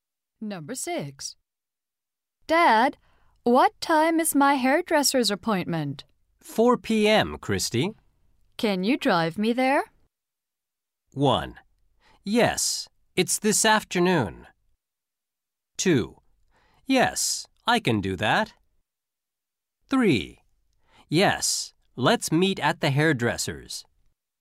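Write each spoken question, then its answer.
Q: Can you drive me there?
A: 2: Yes, I can do that.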